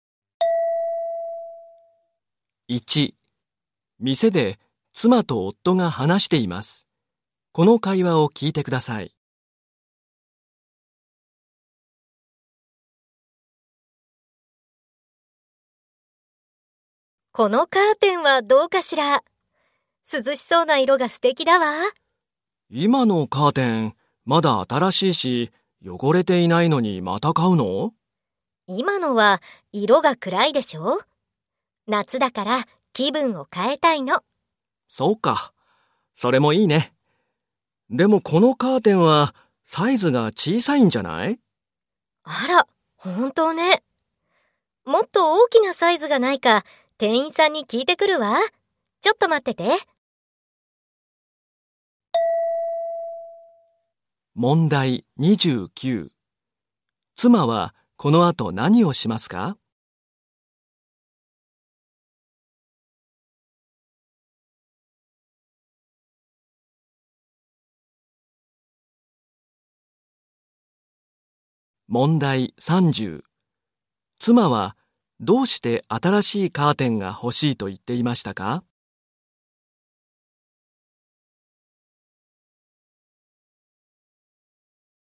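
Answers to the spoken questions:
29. もっと大きなサイズがないか店員に聞きに行く
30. 今のは色が暗く、夏だから気分を変えたいから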